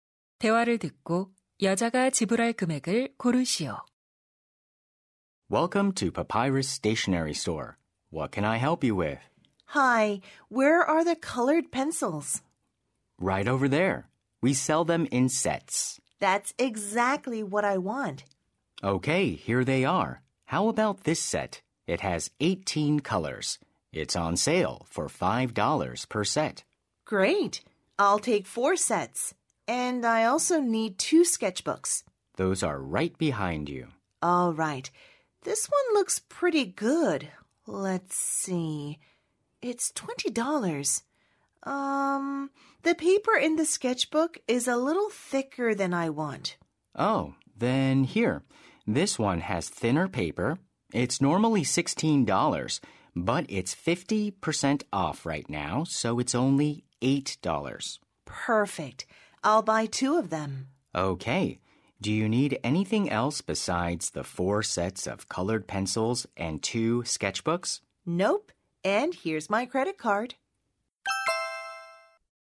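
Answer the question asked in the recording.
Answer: 36달러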